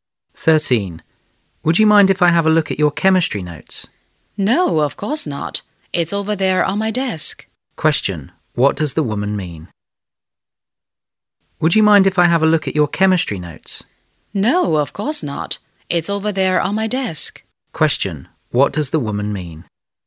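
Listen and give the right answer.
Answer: She doesn't mind; he can look at her chemistry notes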